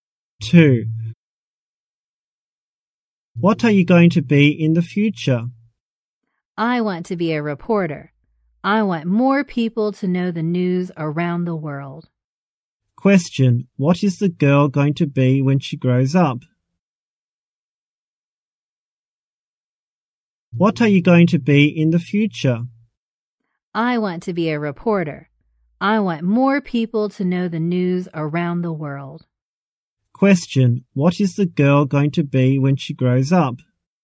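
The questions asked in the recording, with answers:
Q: what is the girl going to be when she grows up?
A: A reporter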